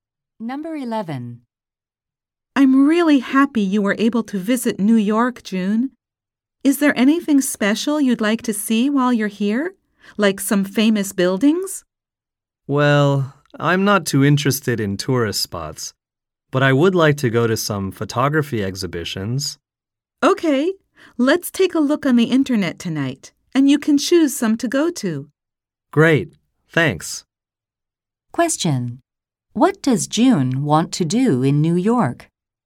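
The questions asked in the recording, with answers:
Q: What does June want to do in New York?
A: Go to photography exhibitions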